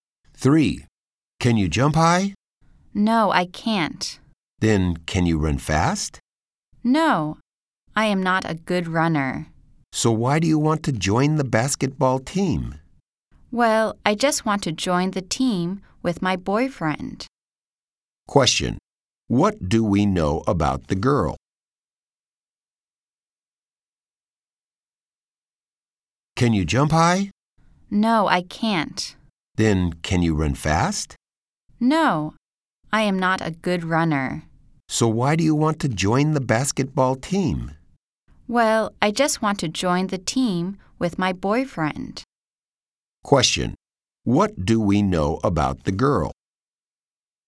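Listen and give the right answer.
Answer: She can't jump high or run fast but wants to join the basketball team with her boyfriend.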